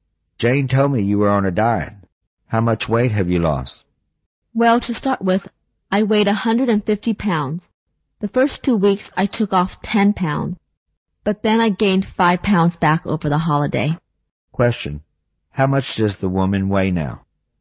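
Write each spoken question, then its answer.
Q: How much does the woman weigh now?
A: 145 pounds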